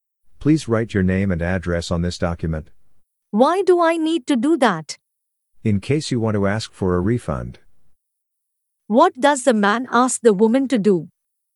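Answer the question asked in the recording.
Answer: write her name and address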